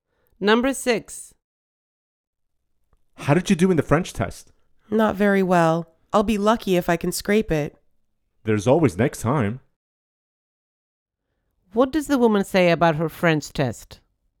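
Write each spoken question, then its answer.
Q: What does the woman say about her French test?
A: She did badly and may barely pass.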